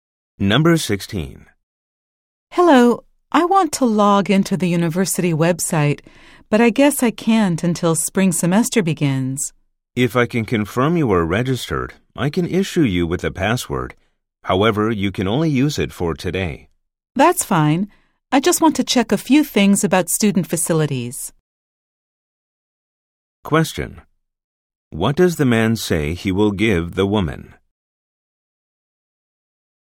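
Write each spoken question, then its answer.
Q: What does the man say he will give the woman?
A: A password she can use only for today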